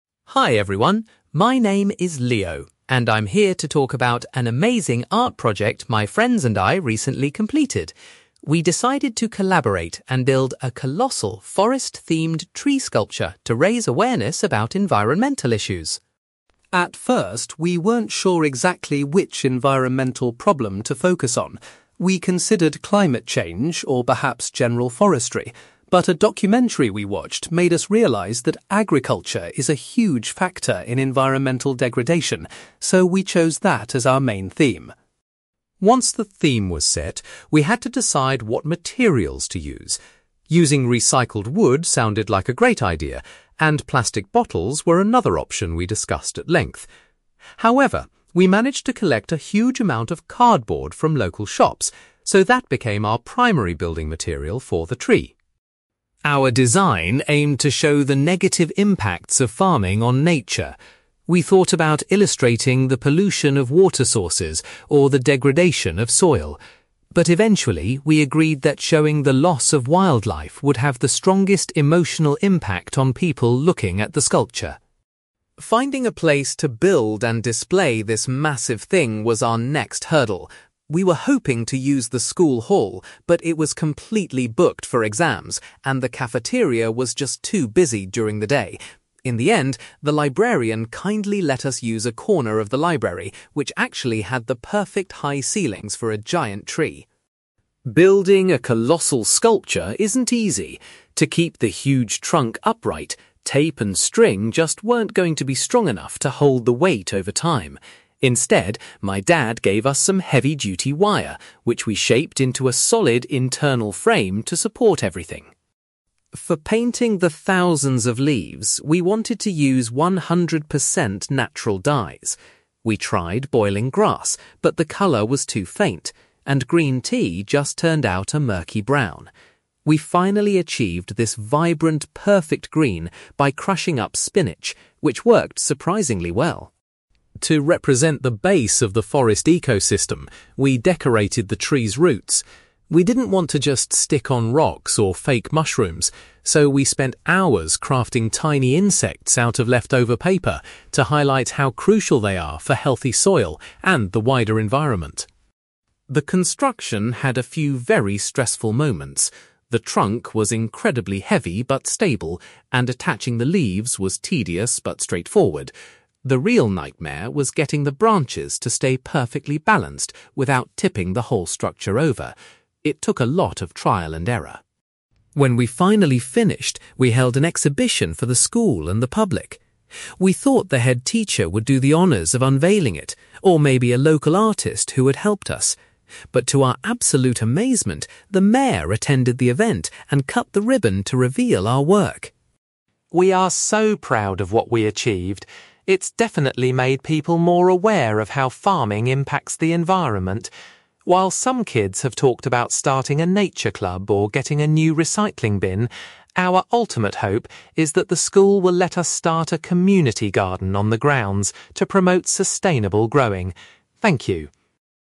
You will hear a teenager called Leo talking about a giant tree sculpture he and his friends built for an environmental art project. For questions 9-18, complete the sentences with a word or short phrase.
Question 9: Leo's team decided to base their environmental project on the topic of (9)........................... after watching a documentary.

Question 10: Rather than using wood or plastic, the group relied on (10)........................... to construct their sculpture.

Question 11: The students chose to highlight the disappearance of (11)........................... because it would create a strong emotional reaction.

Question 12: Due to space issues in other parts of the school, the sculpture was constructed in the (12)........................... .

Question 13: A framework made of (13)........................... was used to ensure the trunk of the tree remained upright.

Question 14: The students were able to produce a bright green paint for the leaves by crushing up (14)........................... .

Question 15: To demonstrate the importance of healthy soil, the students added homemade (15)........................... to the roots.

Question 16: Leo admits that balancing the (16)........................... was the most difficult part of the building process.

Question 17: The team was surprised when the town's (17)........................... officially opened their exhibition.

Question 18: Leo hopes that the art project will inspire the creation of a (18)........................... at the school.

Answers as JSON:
{"9": "agriculture", "10": "cardboard", "11": "wildlife", "12": "library", "13": "wire", "14": "spinach", "15": "insects", "16": "branches", "17": "mayor", "18": "community garden"}

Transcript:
Leo: Hi everyone, my name is Leo, and I'm here to talk about an amazing art project my friends and I recently completed. We decided to collaborate and build a colossal, forest-themed tree sculpture to raise awareness about environmental issues.
At first, we weren't sure exactly which environmental problem to focus on. We considered climate change or perhaps general forestry, but a documentary we watched made us realize that agriculture is a huge factor in environmental degradation, so we chose that as our main theme.
Once the theme was set, we had to decide what materials to use. Using recycled wood sounded like a great idea, and plastic bottles were another option we discussed at length. However, we managed to collect a huge amount of cardboard from local shops, so that became our primary building material for the tree.
Our design aimed to show the negative impacts of farming on nature. We thought about illustrating the pollution of water sources or the degradation of soil. But eventually, we agreed that showing the loss of wildlife would have the strongest emotional impact on people looking at the sculpture.
Finding a place to build and display this massive thing was our next hurdle. We were hoping to use the school hall, but it was completely booked for exams, and the cafeteria was just too busy during the day. In the end, the librarian kindly let us use a corner of the library, which actually had the perfect high ceilings for a giant tree.
Building a colossal sculpture isn't easy. To keep the huge trunk upright, tape and string just weren't going to be strong enough to hold the weight over time. Instead, my dad gave us some heavy-duty wire, which we shaped into a solid internal frame to support everything.
For painting the thousands of leaves, we wanted to use one hundred percent natural dyes. We tried boiling grass, but the colour was too faint, and green tea just turned out a murky brown. We finally achieved this vibrant, perfect green by crushing up spinach, which worked surprisingly well.
To represent the base of the forest ecosystem, we decorated the tree's roots. We didn't want to just stick on rocks or fake mushrooms. So, we spent hours crafting tiny insects out of leftover paper to highlight how crucial they are for healthy soil and the wider environment.
The construction had a few very stressful moments. The trunk was incredibly heavy but stable, and attaching the leaves was tedious but straightforward. The real nightmare was getting the branches to stay perfectly balanced without tipping the whole structure over. It took a lot of trial and error.
When we finally finished, we held an exhibition for the school and the public. We thought the headteacher would do the honours of unveiling it, or maybe a local artist who had helped us. But to our absolute amazement, the mayor attended the event and cut the ribbon to reveal our work.
We are so proud of what we achieved. It's definitely made people more aware of how farming impacts the environment. While some kids have talked about starting a nature club or getting a new recycling bin, our ultimate hope is that the school will let us start a community garden on the grounds to promote sustainable growing. Thank you.

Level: B2